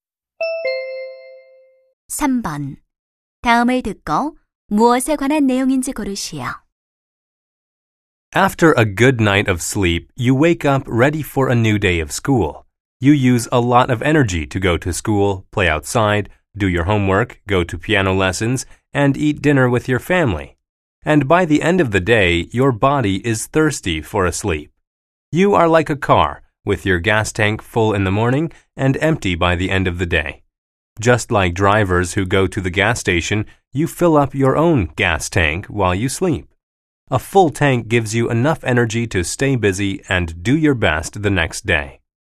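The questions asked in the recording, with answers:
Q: 다음을 듣고 무엇에 관한 내용인지 고르시오.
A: 잠이 다음 날을 위한 에너지를 채워 준다는 것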